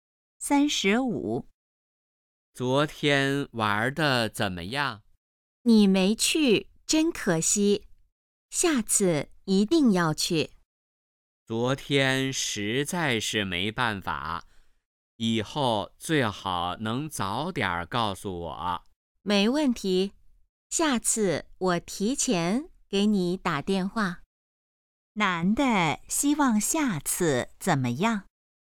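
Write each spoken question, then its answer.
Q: 男的希望下次怎么样?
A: 早点告诉他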